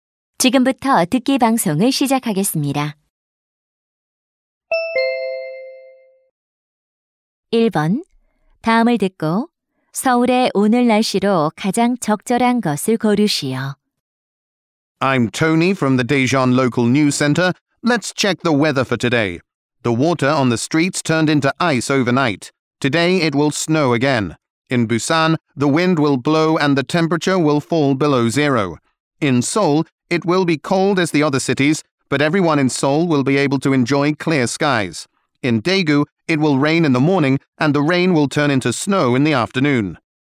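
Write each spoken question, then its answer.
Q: 다음을 듣고 서울의 오늘 날씨로 가장 적절한 것을 고르시오.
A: 춥지만 맑음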